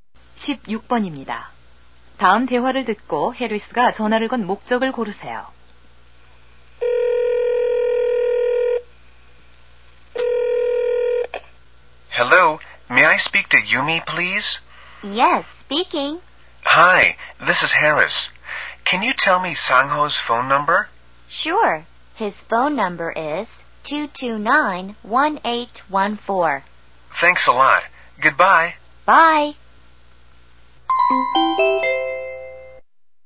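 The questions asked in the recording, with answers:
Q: 다음 대화를 듣고 해리스가 전화를 건 목적을 고르세요.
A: 상호의 전화번호를 물어보려고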